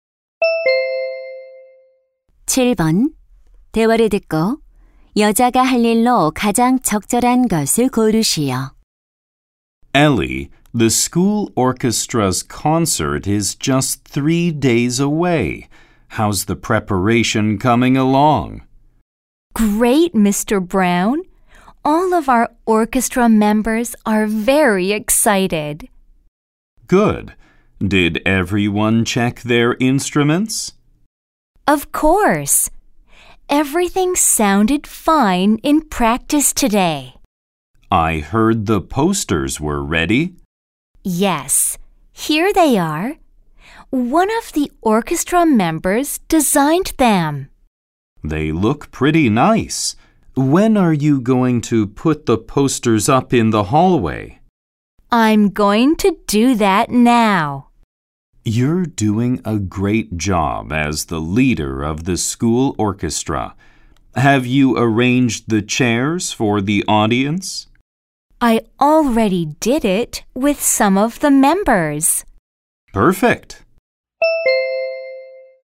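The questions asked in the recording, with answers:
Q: 대화를 듣고 여자가 할 일로 가장 적절한 것을 고르시오.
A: 복도에 포스터 붙이기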